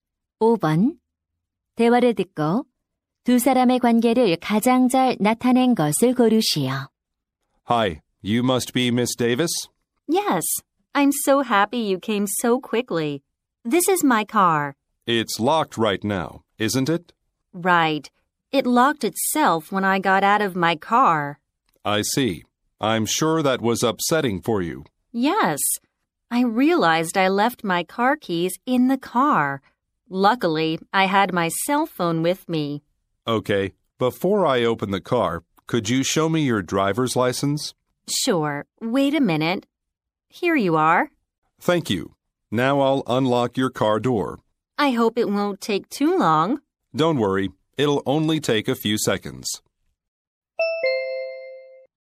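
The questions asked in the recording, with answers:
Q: 대화를 듣고 두 사람의 관계를 가장 잘 나타낸 것을 고르시오.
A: 차 주인 – 자물쇠 기술자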